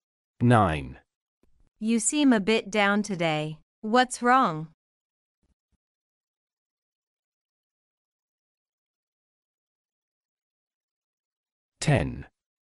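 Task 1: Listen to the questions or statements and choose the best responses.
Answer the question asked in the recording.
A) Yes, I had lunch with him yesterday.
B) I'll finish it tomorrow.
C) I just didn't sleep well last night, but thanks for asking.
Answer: C) I just didn't sleep well last night, but thanks for asking.

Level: A2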